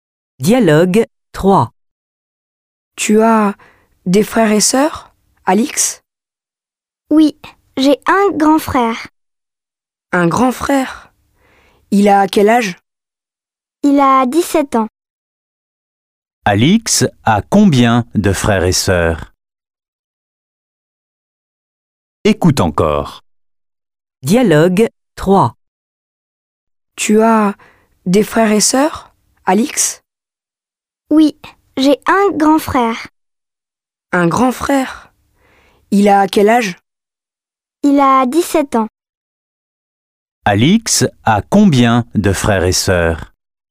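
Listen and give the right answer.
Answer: Un grand frère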